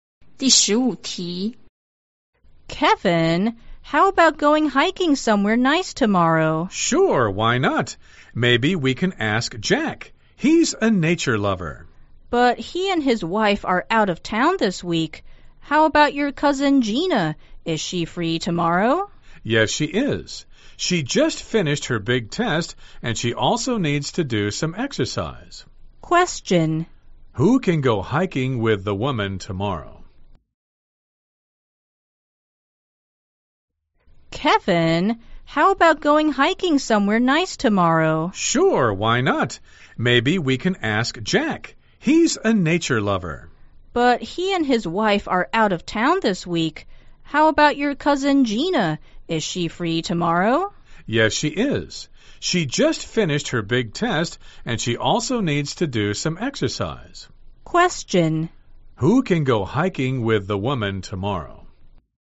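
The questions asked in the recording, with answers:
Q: Who can go hiking with the woman tomorrow?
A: Gina, Kevin's cousin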